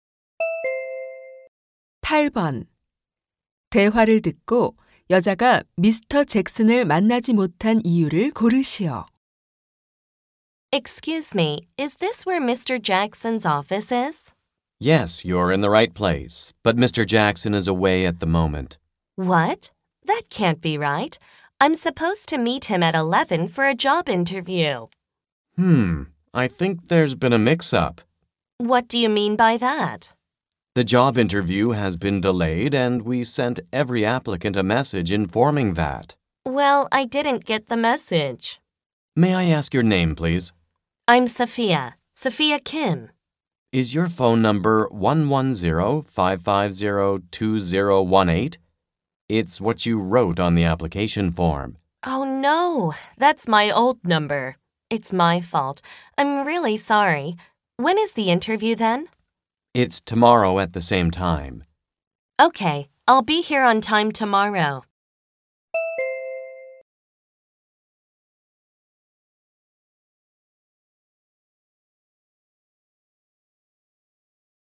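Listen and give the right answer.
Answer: 면접이 연기되었는데 옛 전화번호를 적어서 안내 메시지를 받지 못했기 때문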